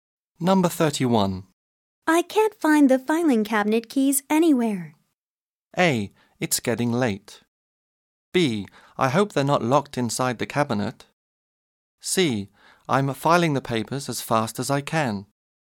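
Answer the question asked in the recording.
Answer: B: I hope they're not locked inside the cabinet.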